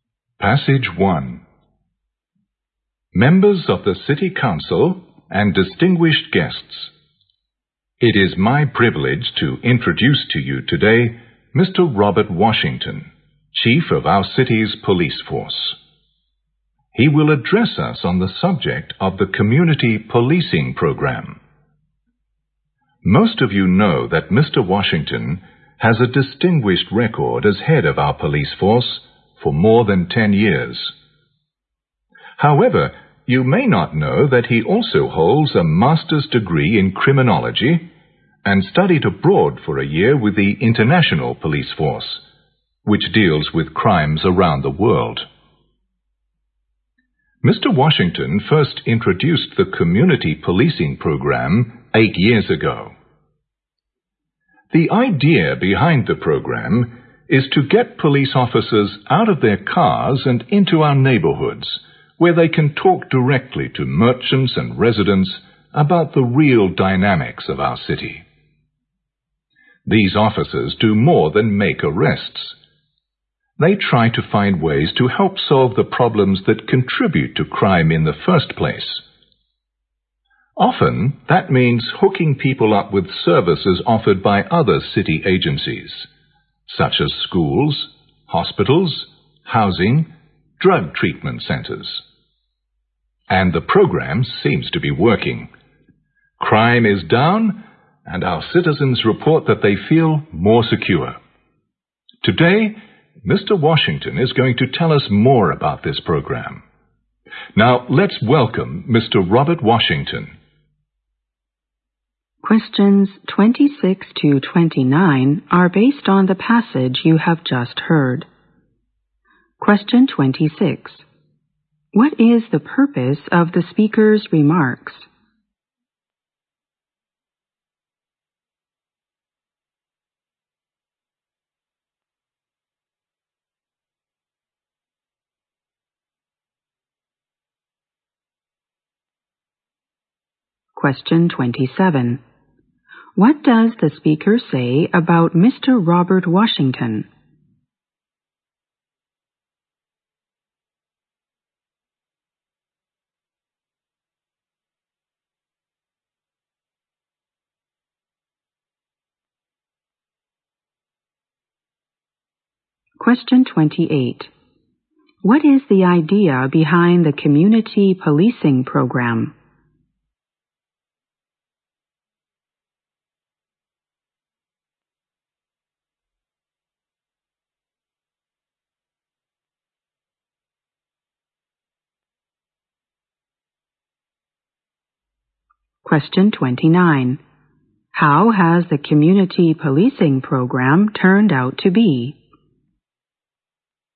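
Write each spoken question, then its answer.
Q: What is the purpose of the speaker's remarks?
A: To introduce Mr. Robert Washington, the city's police chief

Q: What does the speaker say about Mr. Robert Washington?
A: He has headed the police force for over 10 years, holds a master's in criminology and studied abroad with the International Police Force

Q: What is the idea behind the community policing program?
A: To get police officers out of their cars and into neighborhoods to talk with merchants and residents

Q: How has the community policing program turned out to be?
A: Successful: crime is down and citizens feel more secure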